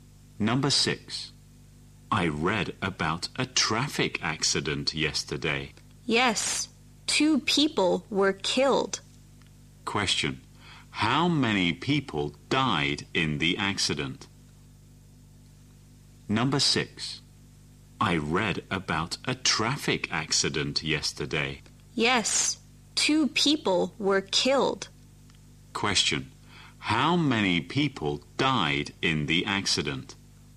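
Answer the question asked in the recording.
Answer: Two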